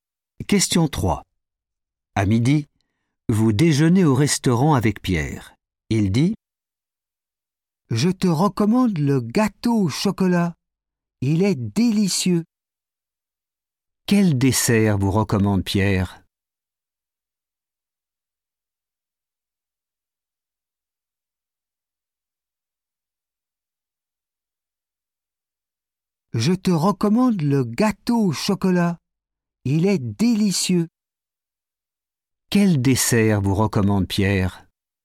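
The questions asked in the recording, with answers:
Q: Quel dessert vous recommande Pierre ?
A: le gâteau au chocolat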